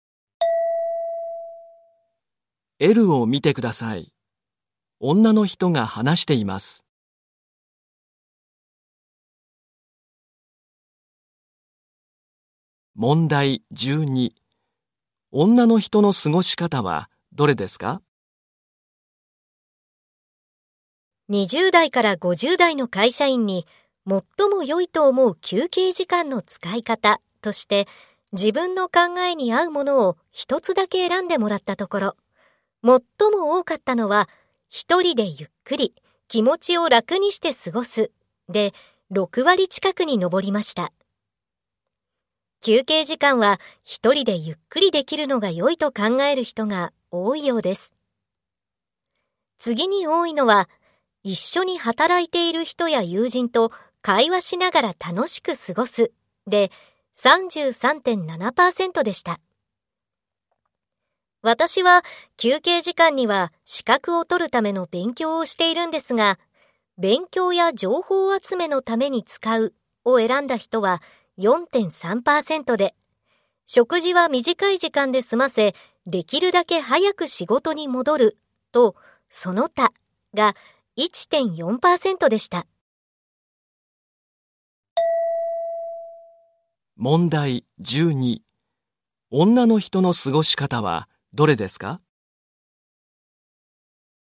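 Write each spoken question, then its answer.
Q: 女の人の過ごし方はどれですか?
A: 資格を取るための勉強(勉強や情報集めのために使う)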